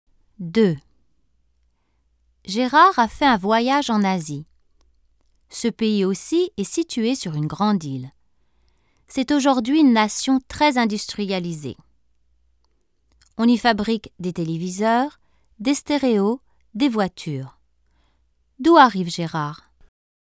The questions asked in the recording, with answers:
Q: D'où arrive Gérard?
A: Il arrive du Japon.